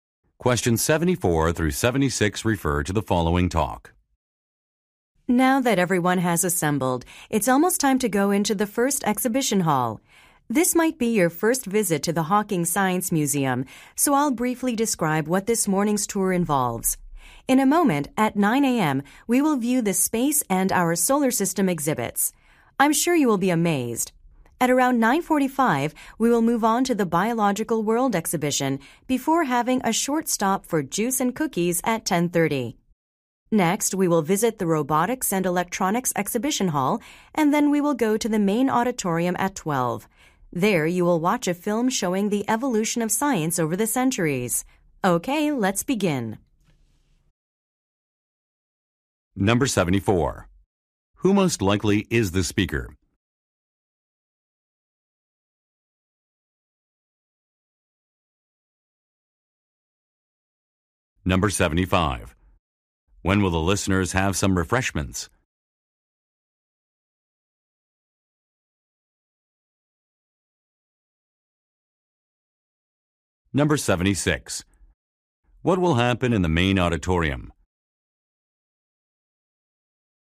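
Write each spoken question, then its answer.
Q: Who most likely is the speaker?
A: A museum tour guide

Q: When will the listeners have some refreshments?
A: At 10:30

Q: What will happen in the main auditorium?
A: A film about the evolution of science will be shown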